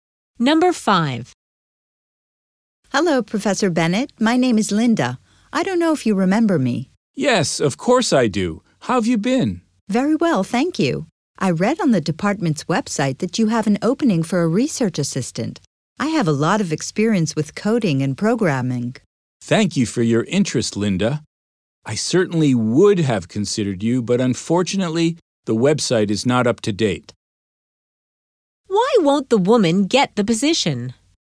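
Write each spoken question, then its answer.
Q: Why won't the woman get the position?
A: The position is no longer open; the website is out of date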